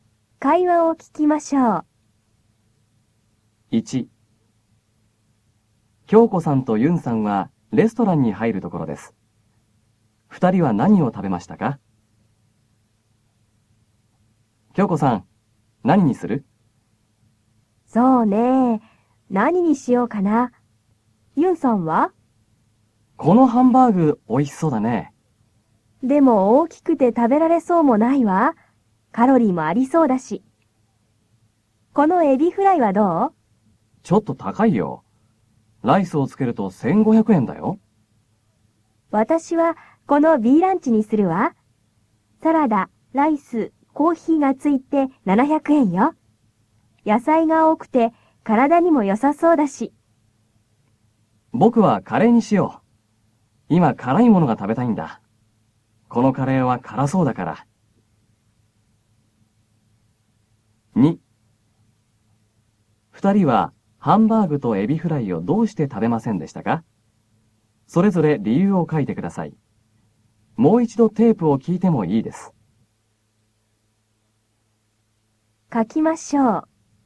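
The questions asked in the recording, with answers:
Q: 二人は何を食べましたか?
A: 京子さんはBランチ、ユンさんはカレー

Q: 二人はハンバーグとエビフライをどうして食べませんでしたか?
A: ハンバーグは大きくて食べられそうもなく、カロリーもありそうだから。エビフライはちょっと高いから。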